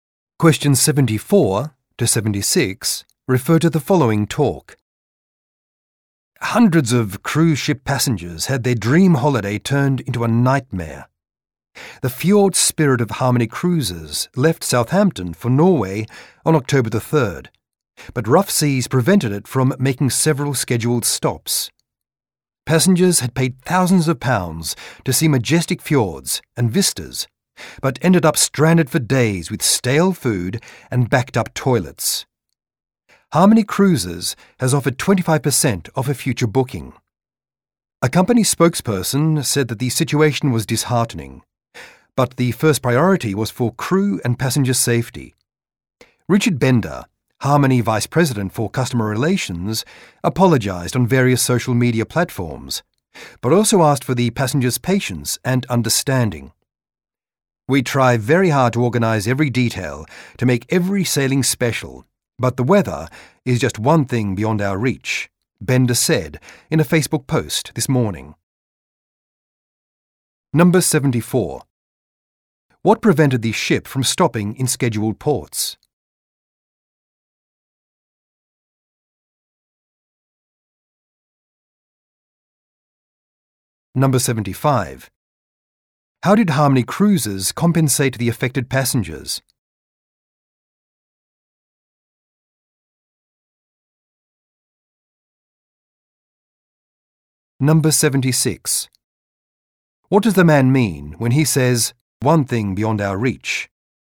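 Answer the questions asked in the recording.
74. Rough seas
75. 25% off a future booking
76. The weather cannot be controlled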